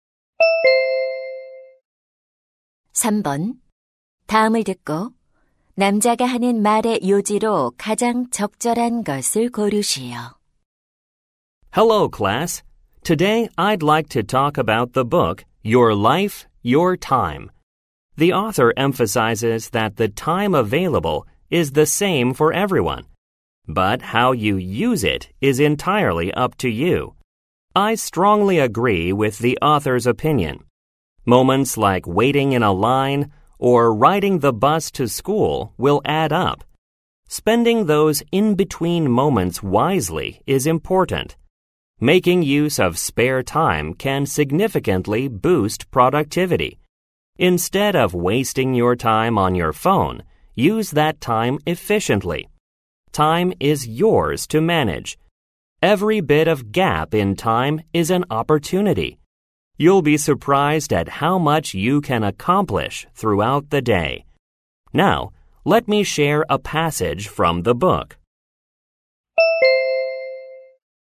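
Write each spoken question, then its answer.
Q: 다음을 듣고 남자가 하는 말의 요지로 가장 적절한 것을 고르시오.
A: 자투리 시간을 현명하게 활용하는 것이 중요하다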